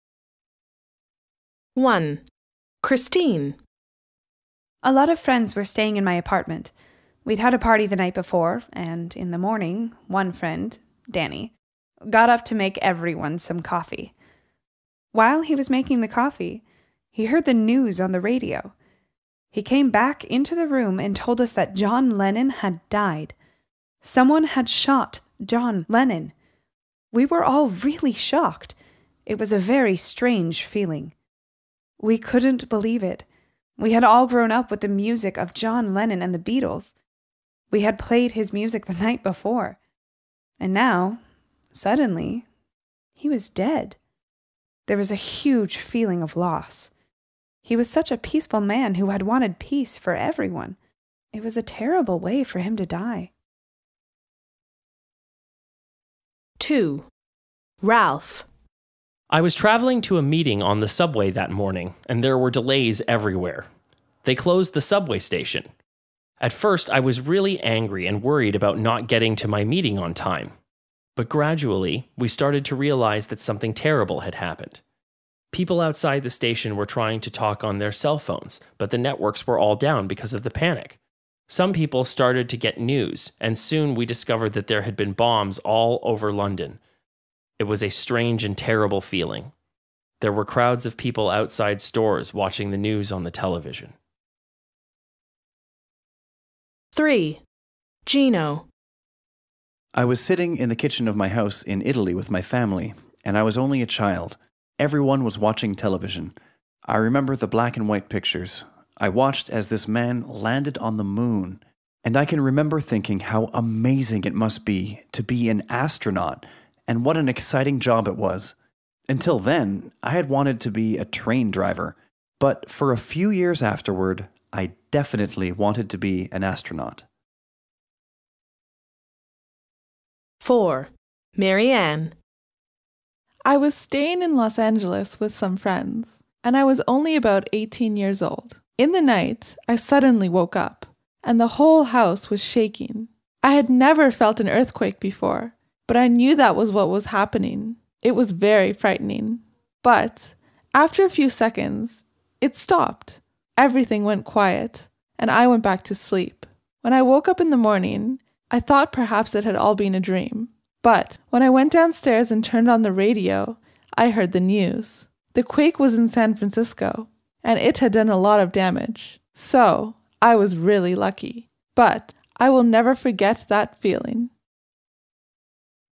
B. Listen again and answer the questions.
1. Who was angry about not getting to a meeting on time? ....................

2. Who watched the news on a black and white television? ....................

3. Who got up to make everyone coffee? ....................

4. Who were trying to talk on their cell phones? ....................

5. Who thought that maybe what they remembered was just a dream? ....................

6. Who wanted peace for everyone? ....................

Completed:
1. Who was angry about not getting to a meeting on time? Rob
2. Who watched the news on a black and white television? Gino
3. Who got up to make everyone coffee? Danny, a friend
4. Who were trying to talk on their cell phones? people outside the station
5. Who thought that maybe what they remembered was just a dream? Marianne
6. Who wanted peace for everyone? John Lennon

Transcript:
1 Christine
A lot of friends were staying in my apartment. We'd had a party the night before, and, in the morning, one friend, Danny, got up to make everyone some coffee. While he was making the coffee, he heard the news on the radio. He came back into the room and told us that John Lennon had died. Someone had shot John Lennon. We were all really shocked. It was a very strange feeling. We couldn't believe it. We had all grown up with the music of John Lennon and the Beatles. We had played his music the night before. And now, suddenly, he was dead. There was a huge feeling of loss. He was such a peaceful man who had wanted peace for everyone. It was a terrible way for him to die.
I was traveling to a meeting on the subway that morning, and there were delays everywhere. They closed the subway station. At first, I was really angry and worried about not getting to my meeting on time. But gradually, we started to realize that something terrible had happened. People outside the station were trying to talk on their cell phones, but the networks were all down because of the panic. Some people started to get news, and soon we discovered there had been bombs all over London. It was a strange and terrible feeling. There were crowds of people outside stores watching the news on the television.
3 Gino
I was sitting in the kitchen of my house in Italy with my family, and I was only a child. Everyone was watching television. I remember the black and white pictures. I watched as this man landed on the moon. And I can remember thinking how amazing it must be to be an astronaut and what an exciting job it was. Until then, I had wanted to be a train driver, but for a few years afterward, I definitely wanted to be an astronaut.
4 Marianne
I was staying in Los Angeles with some friends, and I was only about eighteen years old. In the night, I suddenly woke up, and the whole house was shaking. I had never felt an earthquake before, but I knew that was what was happening. It was very frightening. But, after a few seconds, it stopped. Everything went quiet, and I went back to sleep. When I woke up in the morning, I thought perhaps it had all been a dream. But, when I went downstairs and turned on the radio, I heard the news. The quake was in San Francisco, and it had done a lot of damage. So, I was really lucky. But, I will never forget that feeling.